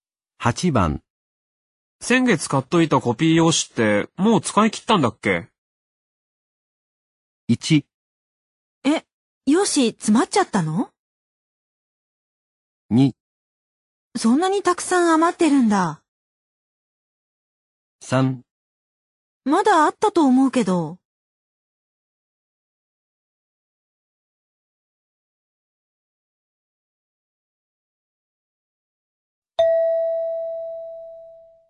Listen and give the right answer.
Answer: 3

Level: N2 Listening · Test 12